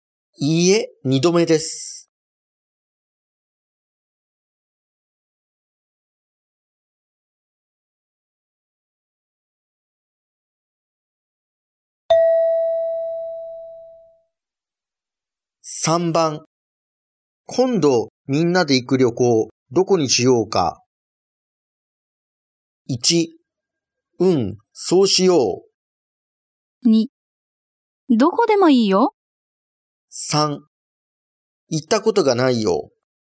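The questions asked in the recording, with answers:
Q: 今度みんなで行く旅行、どこにしようか。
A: 2: どこでもいいよ。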